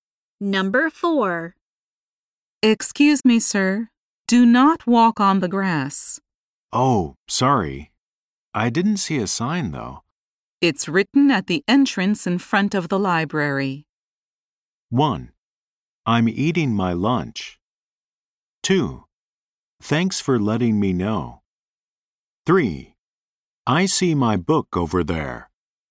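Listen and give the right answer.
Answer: 2: Thanks for letting me know.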